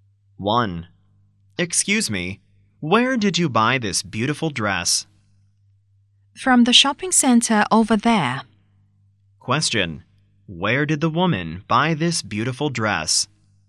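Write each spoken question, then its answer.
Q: Where did the woman buy this beautiful dress?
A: From the shopping center over there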